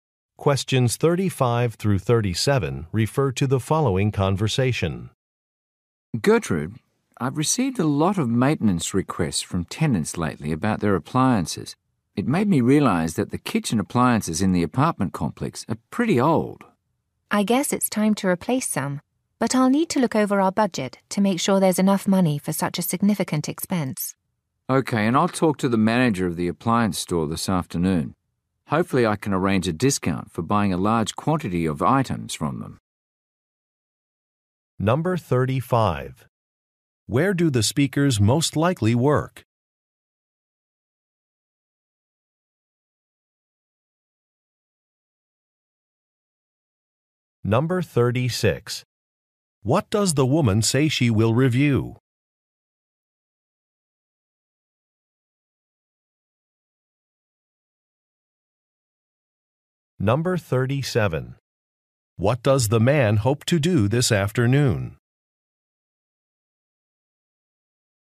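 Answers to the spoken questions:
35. At an apartment complex
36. The budget
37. Arrange a discount for a bulk purchase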